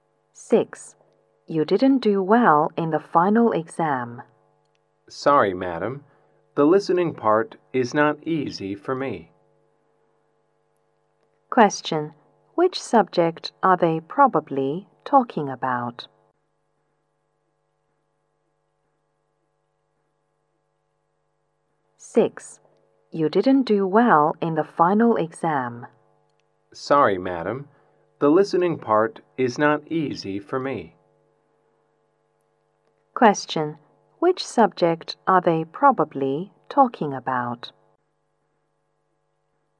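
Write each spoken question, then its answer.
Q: Which subject are they probably talking about?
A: English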